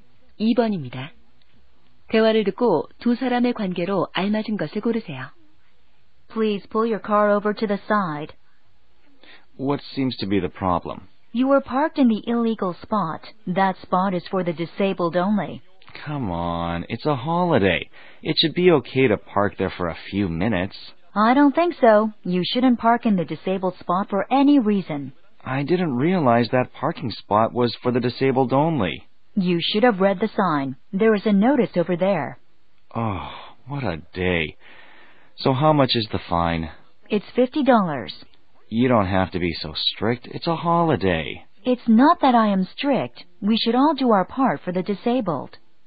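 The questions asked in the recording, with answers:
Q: 대화를 듣고 두 사람의 관계로 알맞은 것을 고르세요.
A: 경찰관과 운전자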